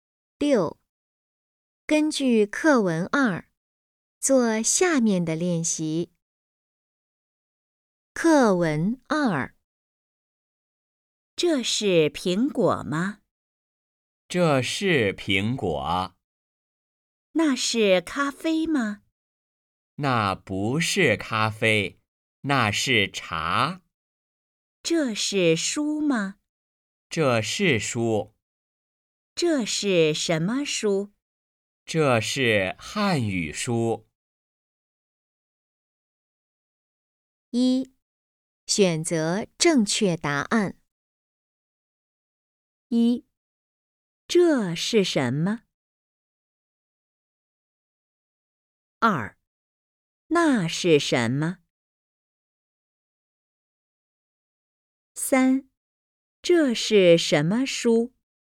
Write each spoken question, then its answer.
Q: 那是什么?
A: 那是茶。

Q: 这是什么书?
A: 这是汉语书。